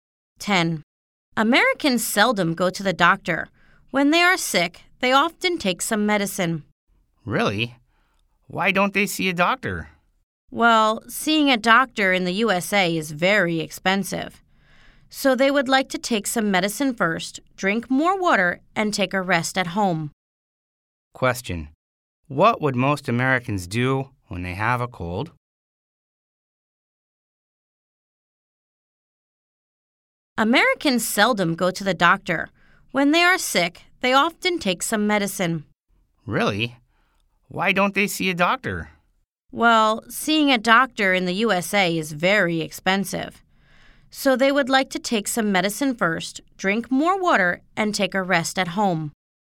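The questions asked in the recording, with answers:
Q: What would most Americans do when they have a cold?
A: Take some medicine, drink more water and rest at home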